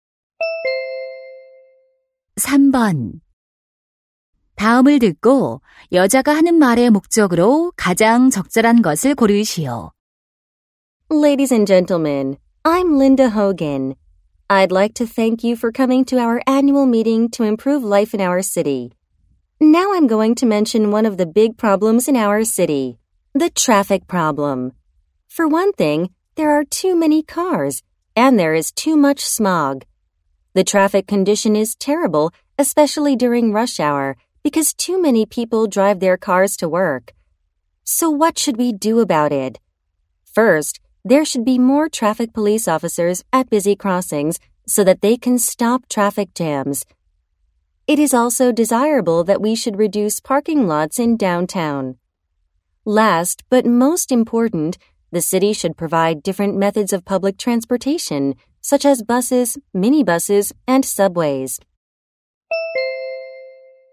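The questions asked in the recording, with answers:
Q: 다음을 듣고 여자가 하는 말의 목적으로 가장 적절한 것을 고르시오.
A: 도시 교통 문제 해결 방안을 제안하려고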